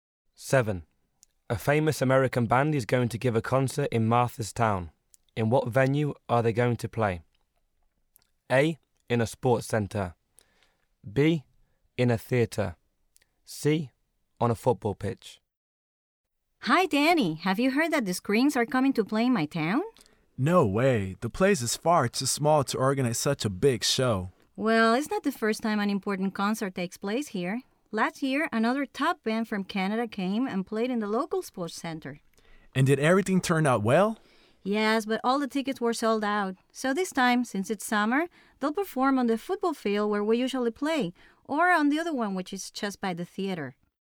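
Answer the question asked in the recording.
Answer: C: On a football pitch.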